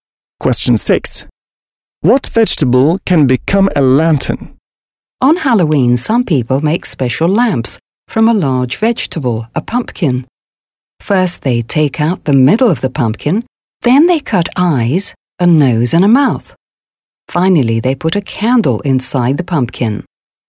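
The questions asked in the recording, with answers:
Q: What vegetable can become a lantern?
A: A pumpkin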